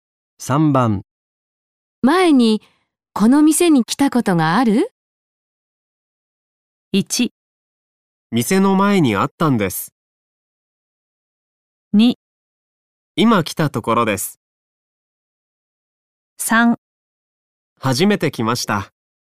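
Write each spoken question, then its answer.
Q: 前にこの店に来たことがある?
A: 3: 初めて来ました。

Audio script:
1
店の前にあったんです。
2
いま来たところです。
3
はじめて来ました。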